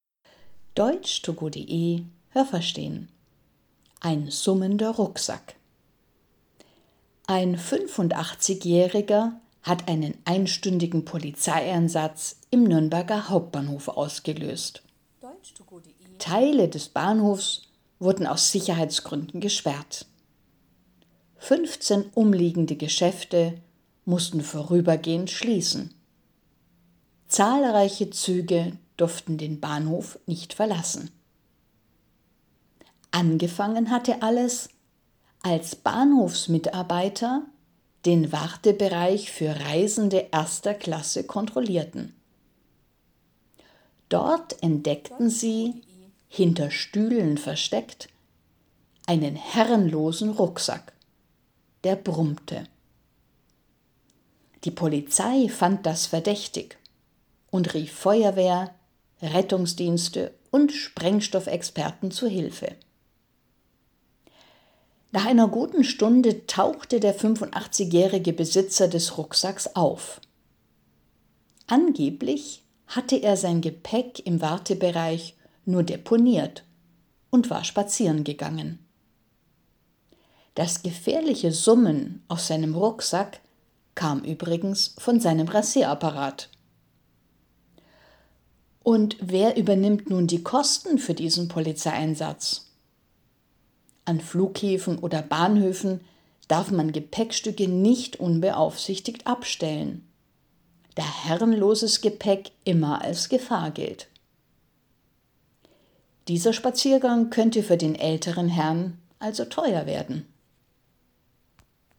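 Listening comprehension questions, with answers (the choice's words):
Was haben Sie gehört? Es gibt nur eine korrekte Antwort.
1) Ein _____ war der Grund für einen großen Polizeieinsatz.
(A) 58-Jähriger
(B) 85-Jähriger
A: 85-Jähriger

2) Am Nürnberger Hauptbahnhof ...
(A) mussten 15 Geschäfte schließen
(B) durften Touristen die Züge nicht verlassen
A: mussten 15 Geschäfte schließen

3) Bahnhofsmitarbeiter haben _____ kontrolliert.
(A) viele Reisende erster Klasse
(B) den Wartebereich erster Klasse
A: den Wartebereich erster Klasse

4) Sie haben einen Rucksack gefunden, ...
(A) der brummte und auf einem Stuhl stand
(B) der summte und niemandem gehörte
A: der summte und niemandem gehörte

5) _____ kamen, um zu helfen.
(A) Feuerwehr und Sprengstoffexperten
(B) Rettungsschwimmer und Sprengstoffexperten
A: Feuerwehr und Sprengstoffexperten

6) Der Rucksack war nicht gefährlich und gehörte einem Mann, ...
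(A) der einen Spaziergang gemacht hatte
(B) der sich einen Rasierapparat kaufen wollte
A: der einen Spaziergang gemacht hatte

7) Der 85-Jährige muss Geld bezahlen, ...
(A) weil er einen Rasierapparat im Rucksack hatte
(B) weil er seinen Rucksack nicht mitgenommen hatte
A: weil er seinen Rucksack nicht mitgenommen hatte

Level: B1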